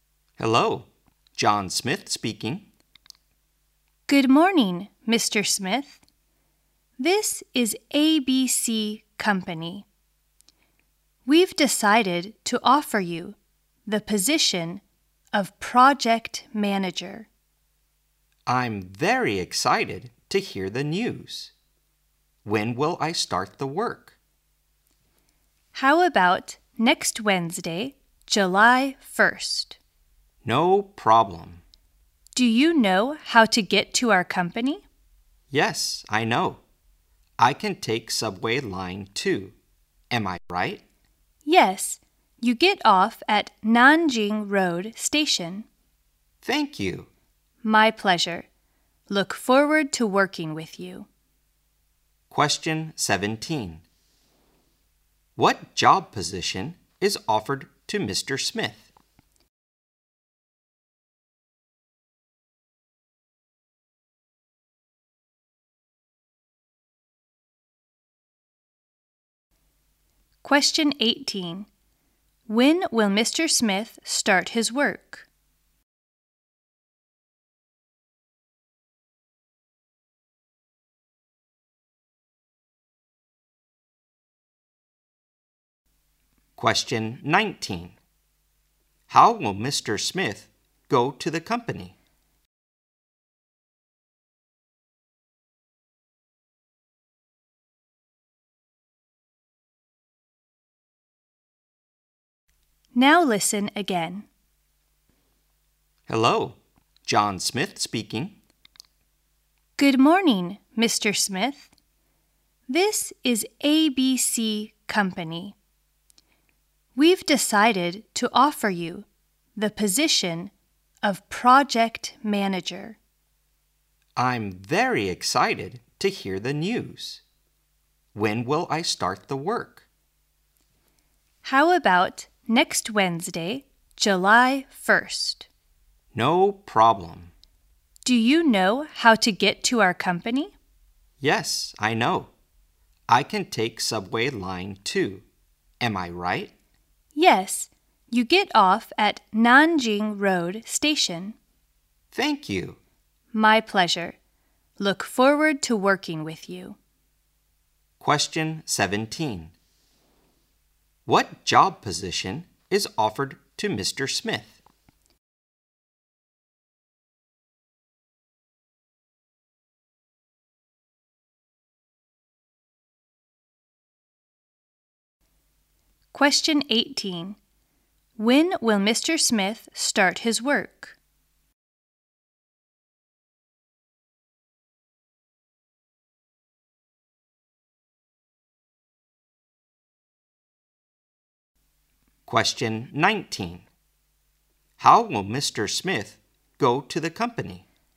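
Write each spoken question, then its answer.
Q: What job position is offered to Mr. Smith?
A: Project manager

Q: When will Mr. Smith start his work?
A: Next Wednesday, July 1st

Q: How will Mr. Smith go to the company?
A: By Subway Line 2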